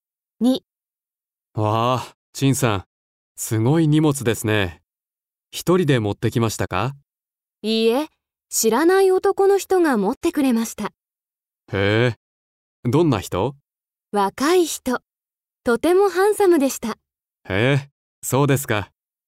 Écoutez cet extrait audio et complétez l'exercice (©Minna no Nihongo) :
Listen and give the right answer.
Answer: 男の人 は チンさん の にもつ を もちました。

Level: JLPT5